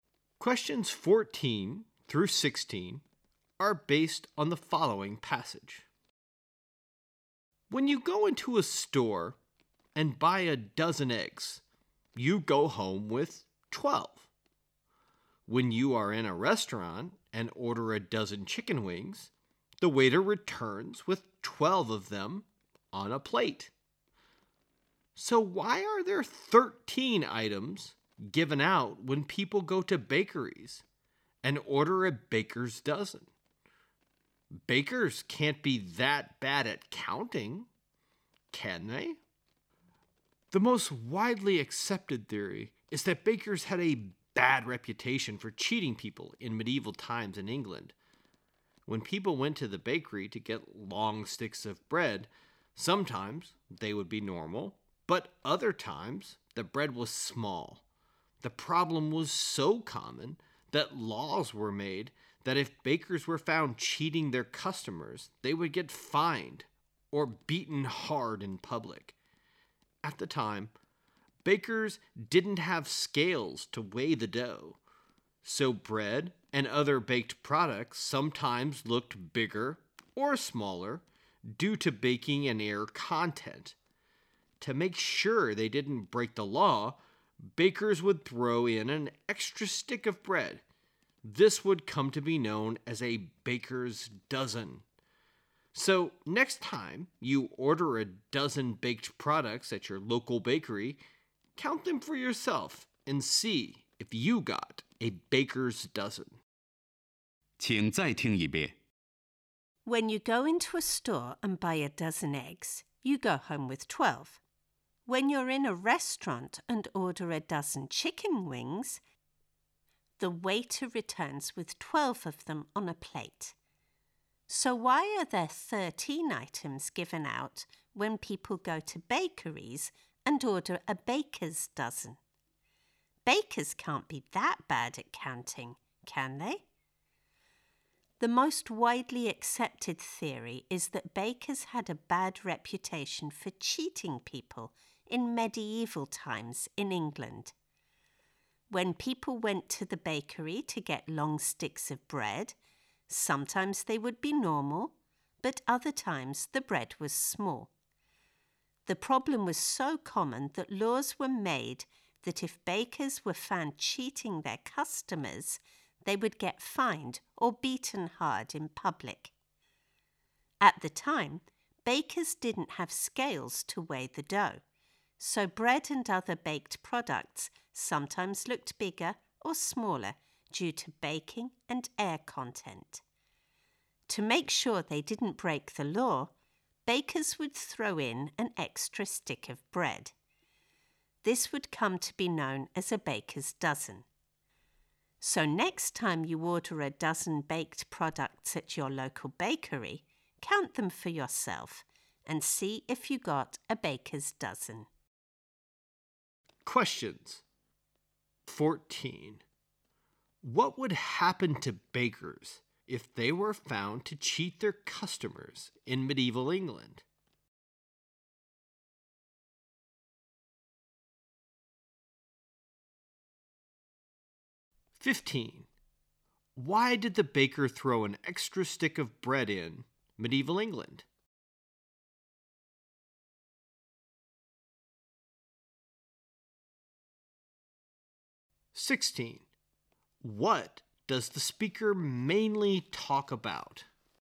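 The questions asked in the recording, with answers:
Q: What would happen to bakers if they were found to cheat their customers in medieval England?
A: They would be fined or beaten in public

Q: Why did the baker throw an extra stick of bread in medieval England?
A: To make sure they didn't break the law

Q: What does the speaker mainly talk about?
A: The origin of the baker's dozen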